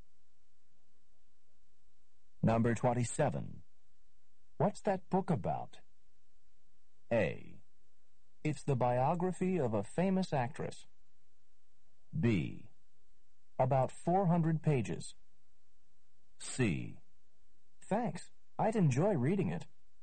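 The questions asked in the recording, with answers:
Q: What's that book about?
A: A: It's the biography of a famous actress.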